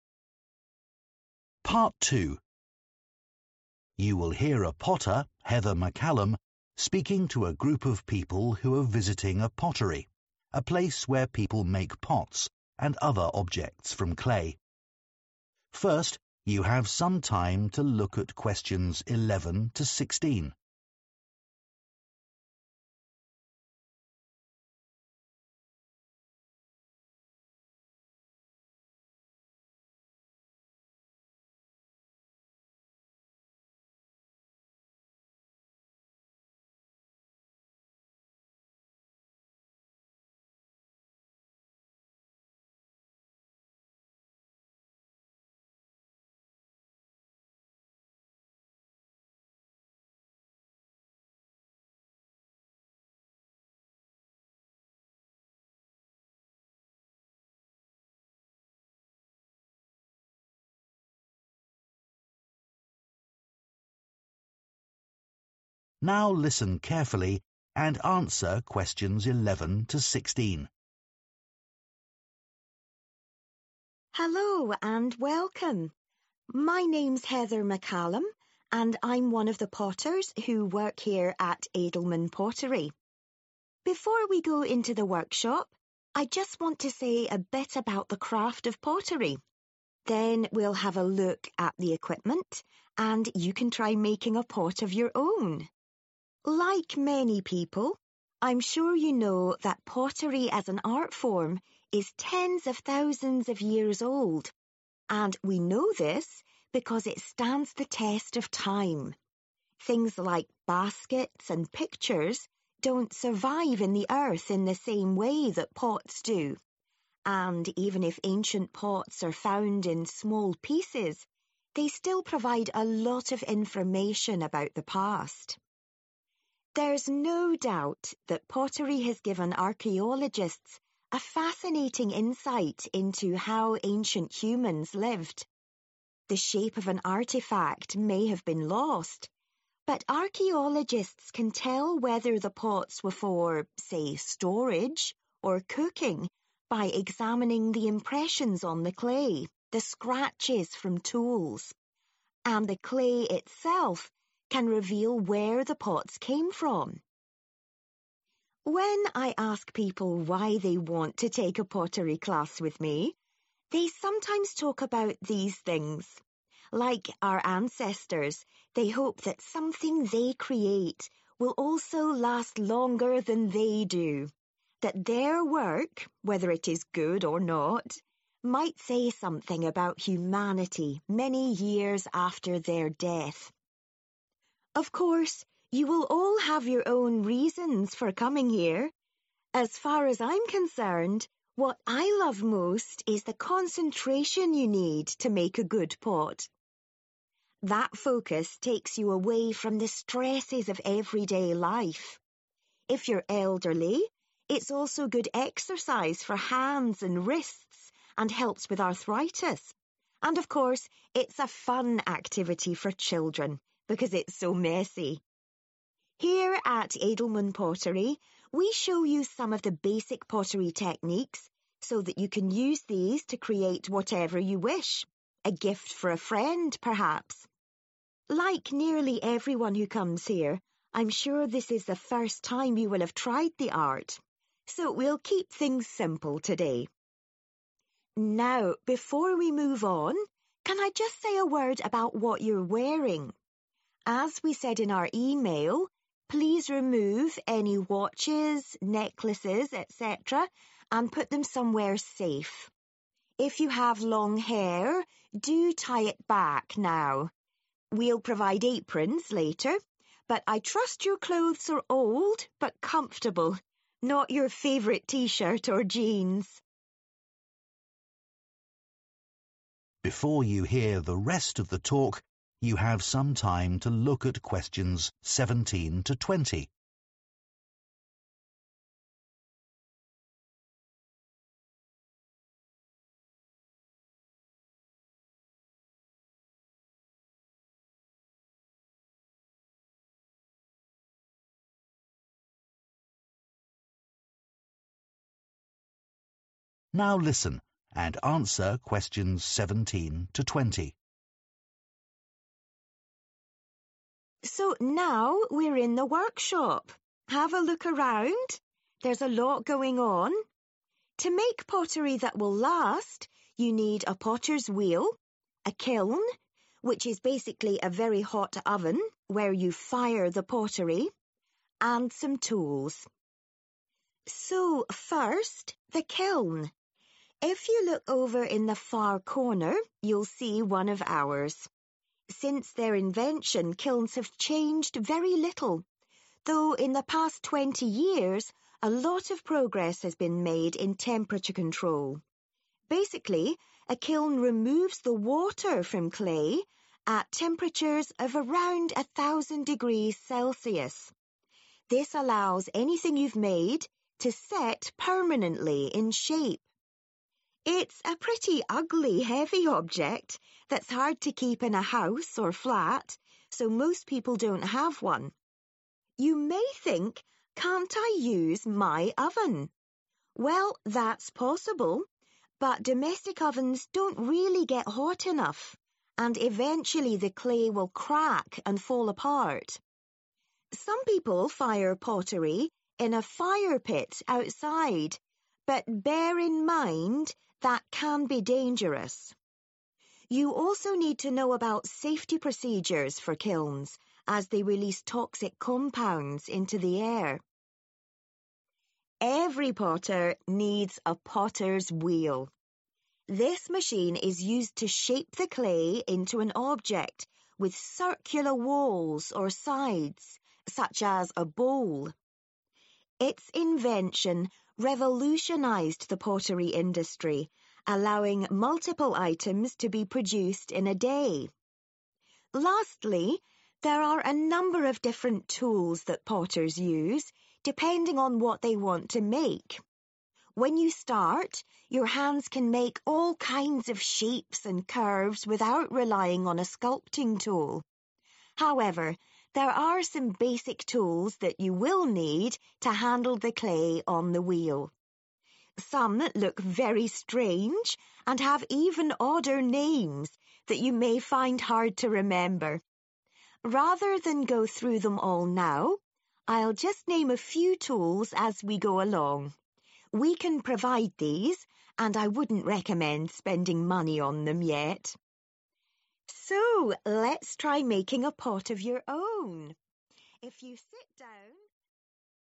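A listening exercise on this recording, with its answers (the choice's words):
Choose the correct letter, A, B or C.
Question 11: Heather says pottery differs from other art forms because ____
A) it lasts longer in the ground.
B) it is practised by more people.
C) it can be repaired more easily.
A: it lasts longer in the ground.

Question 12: Archaeologists sometimes identify the use of ancient pottery from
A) the clay it was made with.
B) the marks that are on it.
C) the basic shape of it.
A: the marks that are on it.

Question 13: Some people join Heather's pottery class because they want to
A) create an item that looks very old.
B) find something that they are good at.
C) make something that will outlive them.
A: make something that will outlive them.

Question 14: What does Heather value most about being a potter?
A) its calming effect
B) its messy nature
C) its physical benefits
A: its calming effect

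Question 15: Most of the visitors to Edelman Pottery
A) bring friends to join courses.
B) have never made a pot before.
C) try to learn techniques too quickly.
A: have never made a pot before.

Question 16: Heather reminds her visitors that they should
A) put on their aprons.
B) change their clothes.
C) take off their jewellery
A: take off their jewellery

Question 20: Which TWO points does Heather make about a potter's tools?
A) Some are hard to hold.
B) Some are worth buying.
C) Some are essential items.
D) Some have memorable names.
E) Some are available for use by participants.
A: Some are available for use by participants.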